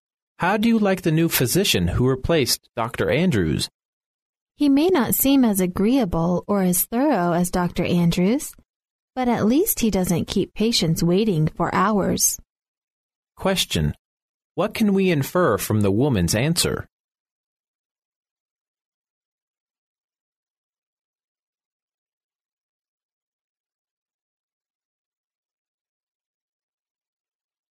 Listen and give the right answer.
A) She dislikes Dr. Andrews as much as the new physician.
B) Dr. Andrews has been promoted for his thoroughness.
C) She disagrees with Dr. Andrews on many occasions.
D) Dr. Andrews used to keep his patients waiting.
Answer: D) Dr. Andrews used to keep his patients waiting.

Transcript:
[听力原文] M: How do you like the new physician who replaced Dr. Andrews? W: He may not seem as agreeable or as thorough as Dr. Andrews, but at least he doesn't keep patients waiting for hours. Q: What can we infer from the woman's answer?